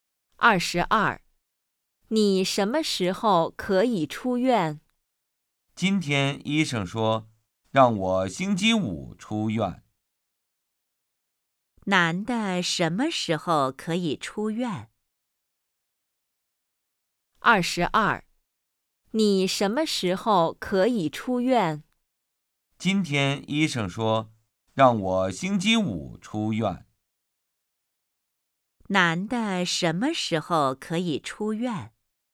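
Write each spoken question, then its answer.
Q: 男的什么时候可以出院?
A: 星期五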